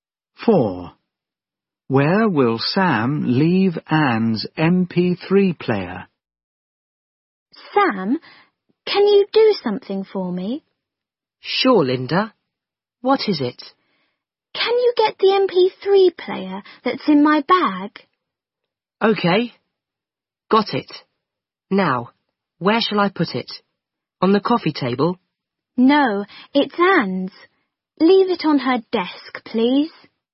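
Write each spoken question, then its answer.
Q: Where will Sam leave Anne's MP3 player?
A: On her desk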